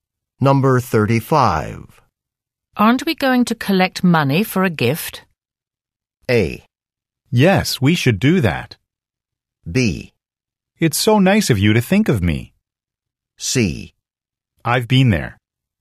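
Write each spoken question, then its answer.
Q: Aren't we going to collect money for a gift?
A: A: Yes, we should do that.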